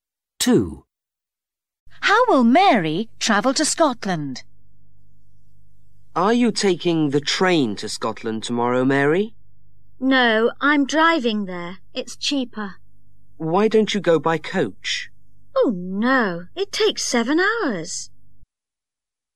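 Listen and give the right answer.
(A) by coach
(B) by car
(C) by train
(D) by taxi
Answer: (B) by car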